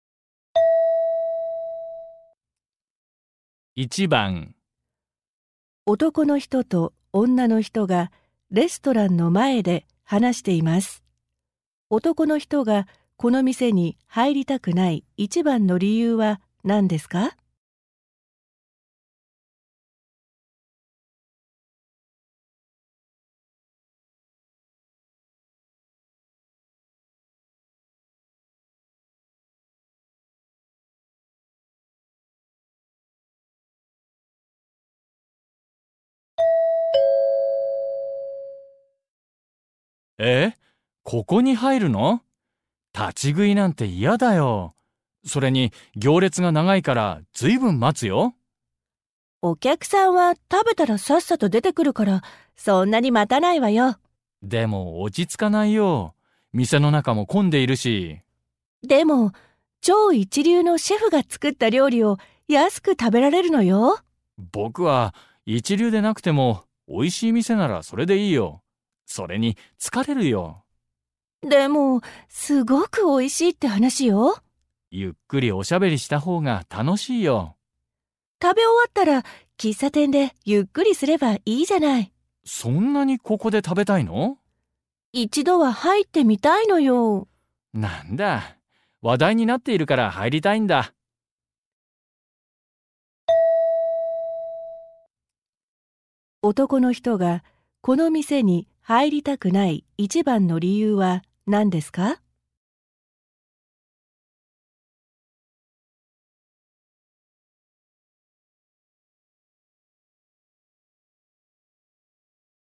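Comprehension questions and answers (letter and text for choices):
問題2では、まず質問を聞いてください。そのあと、問題用紙のせんたくしを読んでください。読む時間があります。それから話を聞いて、問題用紙の1から4の中から、最もよいものを一つ選んでください。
男の人がこの店に入りたくない一番の理由は何ですか。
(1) 行列しているから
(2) 落ち着かないから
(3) おいしくないから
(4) 座れないから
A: (4) 座れないから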